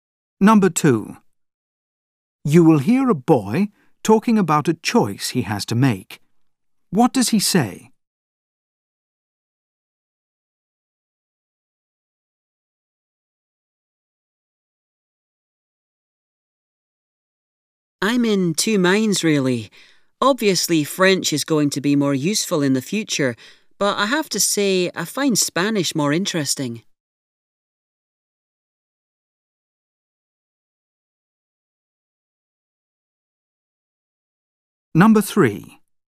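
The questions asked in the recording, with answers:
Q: What does he say?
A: He can't decide between French (more useful) and Spanish (more interesting)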